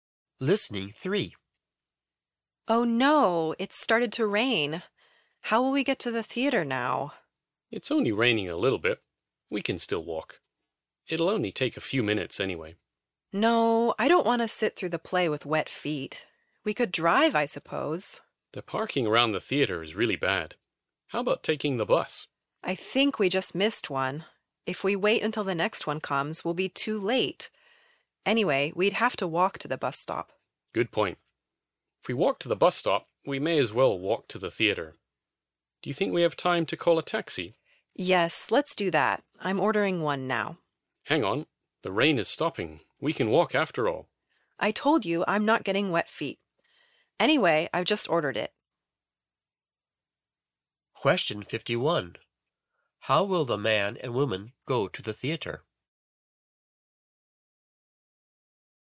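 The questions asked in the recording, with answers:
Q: How will the man and woman go to the theater?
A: By taxi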